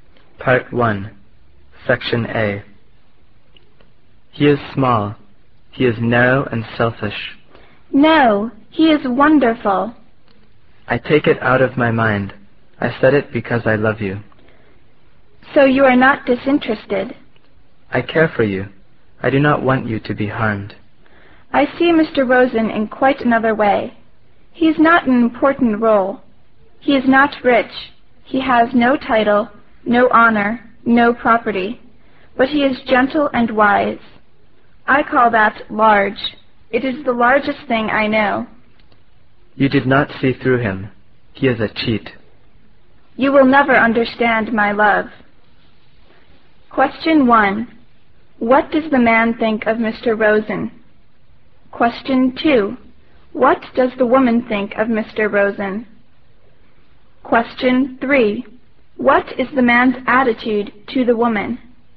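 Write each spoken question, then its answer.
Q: What does the man think of Mr. Rosen?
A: He thinks Mr. Rosen is small, narrow, selfish and a cheat

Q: What does the woman think of Mr. Rosen?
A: She thinks he is wonderful, gentle and wise

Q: What is the man's attitude to the woman?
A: He loves and cares for her and doesn't want her to be harmed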